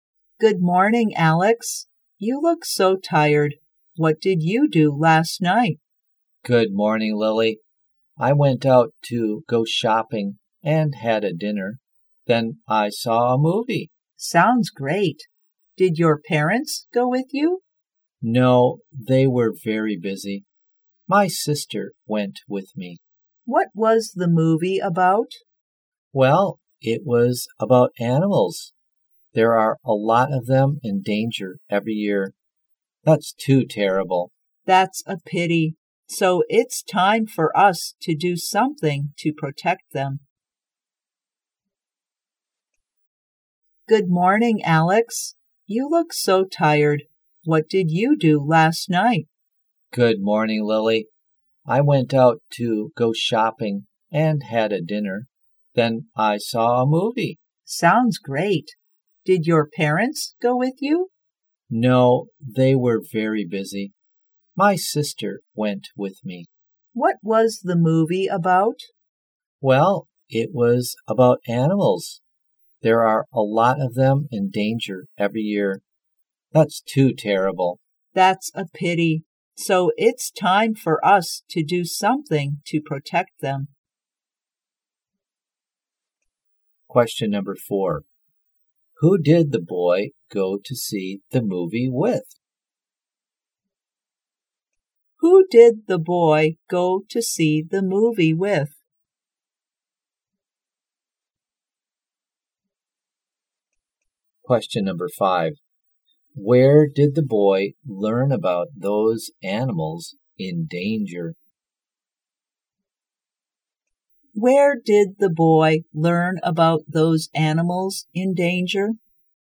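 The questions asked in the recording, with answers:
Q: Who did the boy go to see the movie with?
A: His sister.

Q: Where did the boy learn about those animals in danger?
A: From a movie.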